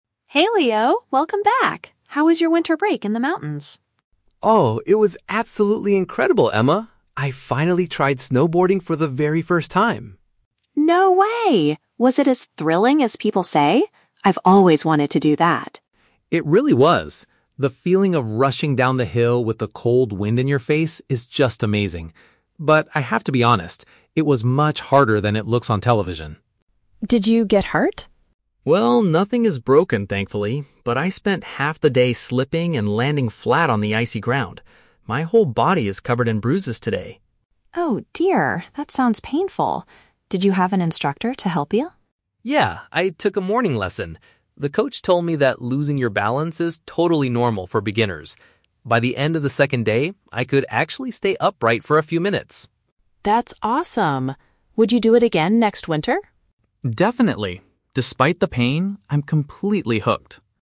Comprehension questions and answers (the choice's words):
Listen to the conversation between two classmates about a winter vacation. Choose the correct answer (A, B, or C) for each question.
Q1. What is Leo's overall opinion of his snowboarding experience?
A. He found it quite boring compared to watching sports on television.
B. He thoroughly enjoyed the exciting trip even though it was physically painful.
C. He decided he will never do it again because the weather was too cold.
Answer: He thoroughly enjoyed the exciting trip even though it was physically painful.

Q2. What happened to Leo during his time on the mountain?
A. He struggled to stay on his feet and fell over frequently.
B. He accidentally broke a bone while coming down the hill.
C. He couldn't find a professional teacher to show him what to do.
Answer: He struggled to stay on his feet and fell over frequently.

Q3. What did the coach explain to Leo?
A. That he needs to buy better protective equipment to avoid bruises.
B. That standing completely upright is impossible on the first day.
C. That struggling to stay steady is expected for new learners.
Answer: That struggling to stay steady is expected for new learners.

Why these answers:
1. Leo says the trip was "absolutely incredible" and he is "completely hooked" (he wants to do it again), but he also mentions his body is "covered in bruises" (physically painful). This perfectly matches option B. Why the traps are wrong: Option A is a trap using the word "television" from the audio, but he didn't say it was boring; he said it was "harder than it looks on television". Option C uses the word "cold" from the audio, but he explicitly says he will "definitely" do it again.
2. Leo says, "I spent half the day slipping and landing flat on the icy ground." "Slipping and landing flat" is a paraphrase for falling over frequently, and "struggled to stay on his feet" matches the context. Why the traps are wrong: Option B is incorrect because Leo clearly states, "nothing is broken, thankfully." Option C is wrong because he says, "I took a morning lesson," meaning he did have a teacher.
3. The coach told him that "losing your balance is totally normal for beginners." "Struggling to stay steady" is a synonym for losing balance, and "new learners" means beginners. Why the traps are wrong: Option A is plausible in real life, but the coach never mentioned protective equipment in the audio. Option B is a trap; Leo mentions he could "stay upright" by the second day, but the coach never said it was "impossible" on the first day.

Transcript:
Emma: Hey Leo! Welcome back. How was your winter break in the mountains?
Leo: Oh, it was absolutely incredible, Emma! I finally tried snowboarding for the very first time.
Emma: No way! Was it as thrilling as people say? I've always wanted to do that.
Leo: It really was. The feeling of rushing down the hill with the cold wind in your face is just amazing. But, I have to be honest, it was much harder than it looks on television.
Emma: Did you get hurt?
Leo: Well, nothing is broken, thankfully. But I spent half the day slipping and landing flat on the icy ground. My whole body is covered in bruises today.
Emma: Oh dear, that sounds painful. Did you have an instructor to help you?
Leo: Yeah, I took a morning lesson. The coach told me that losing your balance is totally normal for beginners. By the end of the second day, I could actually stay upright for a few minutes.
Emma: That's awesome. Would you do it again next winter?